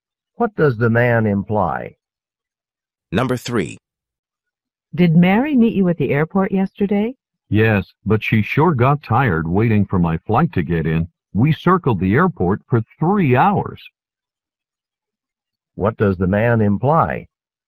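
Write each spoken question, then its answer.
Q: What does the man imply?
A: His flight arrived about 3 hours late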